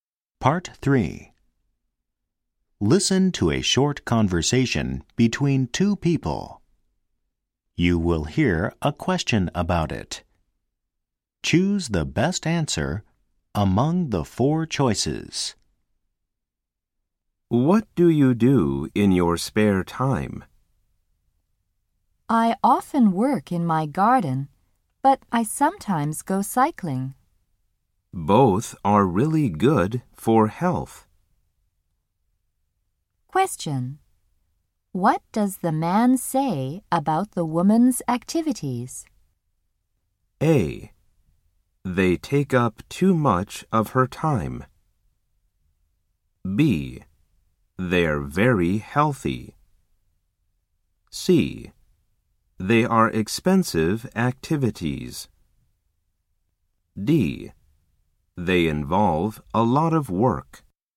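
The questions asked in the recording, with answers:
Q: Question. What does the man say about the woman's activities?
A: B: They're very healthy.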